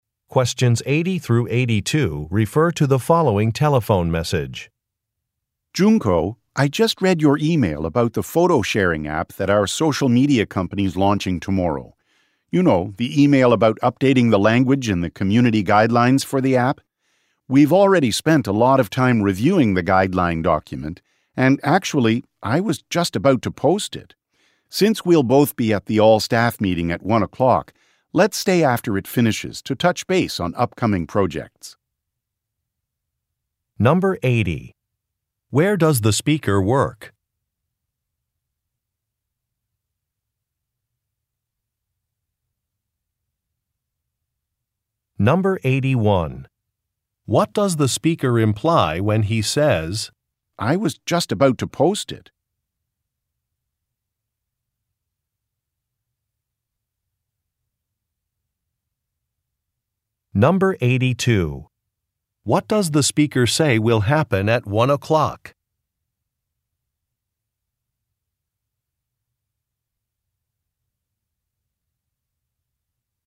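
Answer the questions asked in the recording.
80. At a social media company
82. An all-staff meeting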